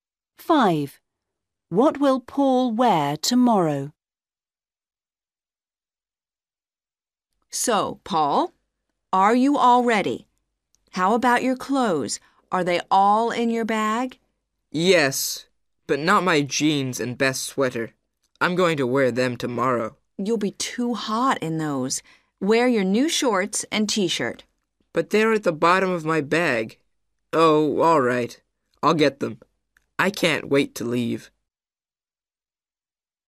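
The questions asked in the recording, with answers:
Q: What will Paul wear tomorrow?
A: new shorts and t-shirt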